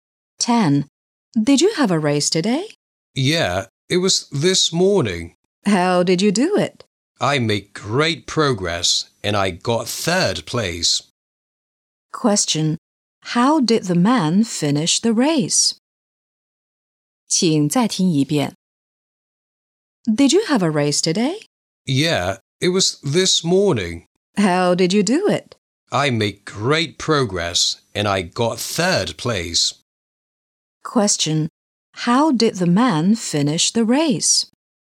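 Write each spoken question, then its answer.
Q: How did the man finish the race?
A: He got third place.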